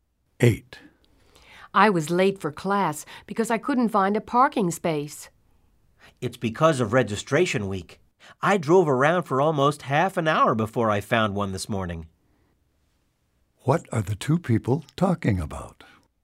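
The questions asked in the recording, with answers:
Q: What are the two people talking about?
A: Finding a parking space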